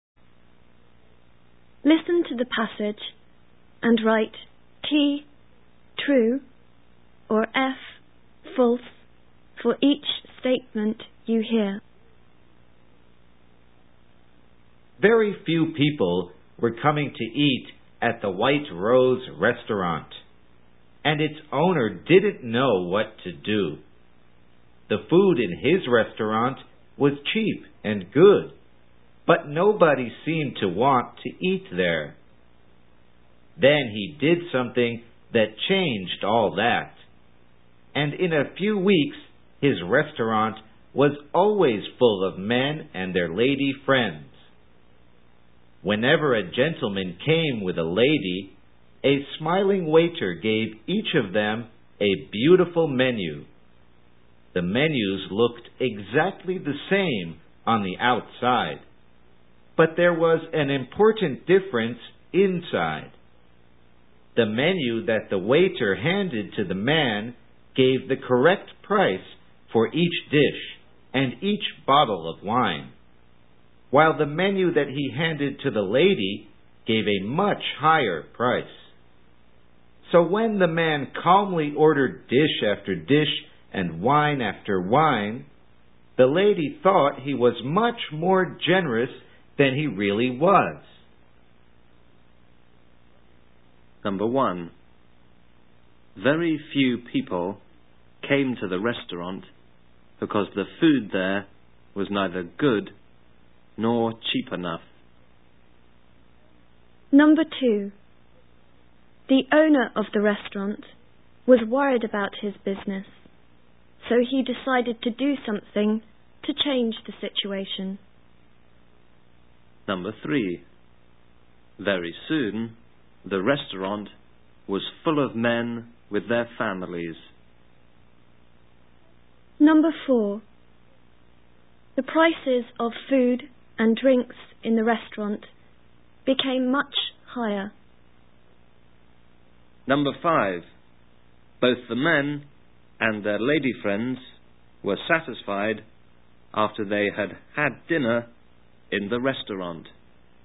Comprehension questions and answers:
II. Directions: Listen to the passage and write 'T' (true) or 'F' (false) for each statement you hear.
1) Very few people came to the restaurant because the food there was neither good nor cheap enough.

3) Very soon the restaurant was full of men with their families.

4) The prices of food and drinks in the restaurant became much higher.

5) Both the men and their lady friends were satisfied after they had had dinner in the restaurant.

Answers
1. F
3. F
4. F
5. T